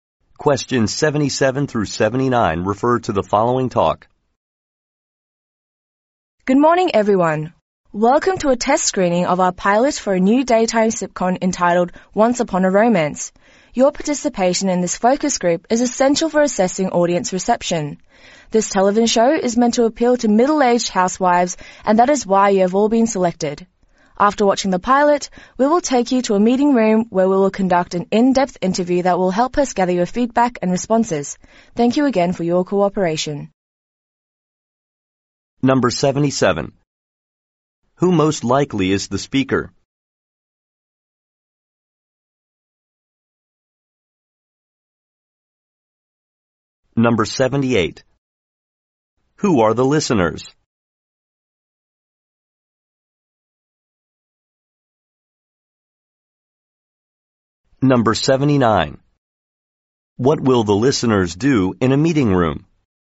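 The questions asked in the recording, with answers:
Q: Who are the listeners?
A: Middle-aged housewives

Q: What will the listeners do in a meeting room?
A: Take part in an in-depth interview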